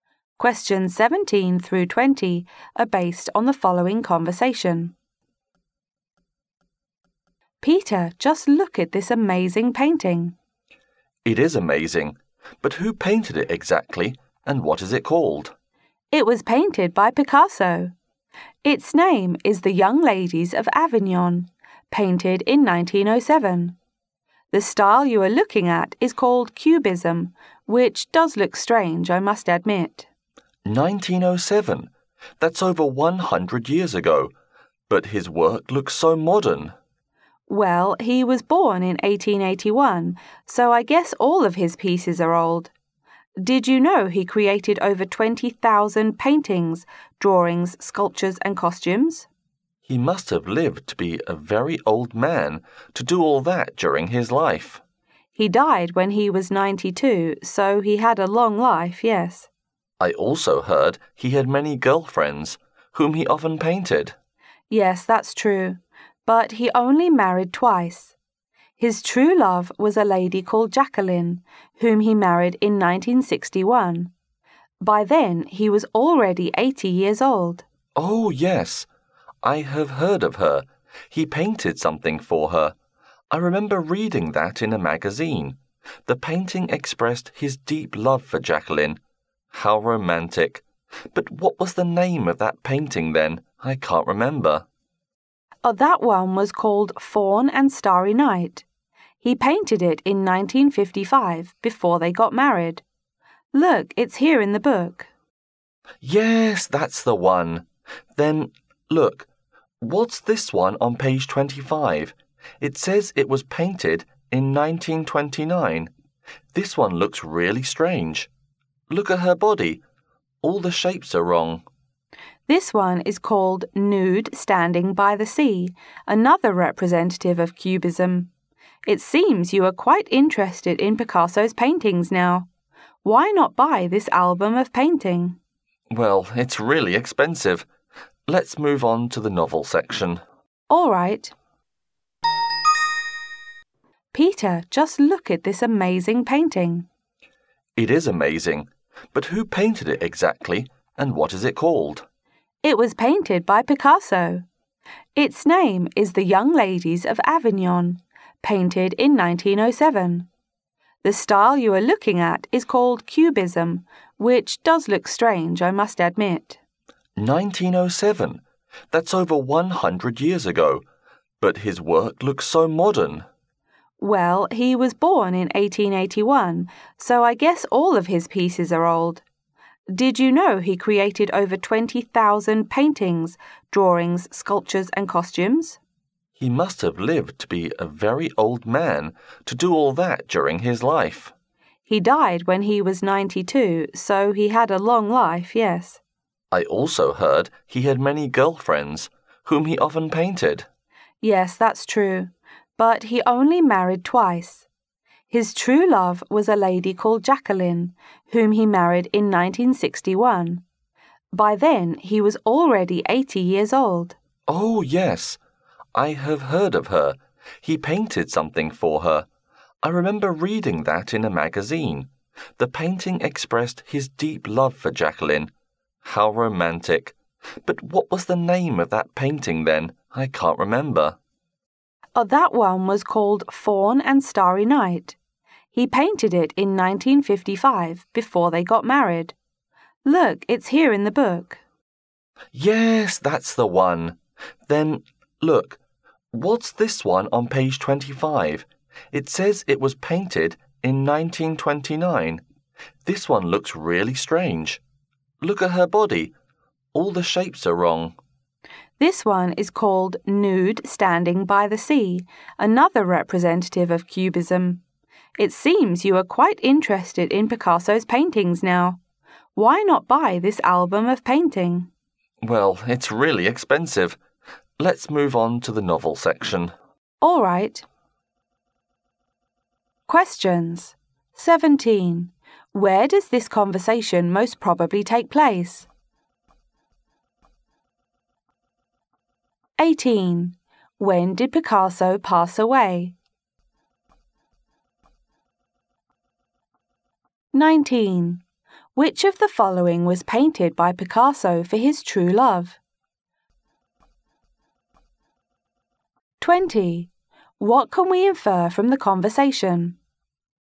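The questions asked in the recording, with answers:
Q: When did Picasso pass away?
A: In 1973

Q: Which of the following was painted by Picasso for his true love?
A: Fawn and Starry Night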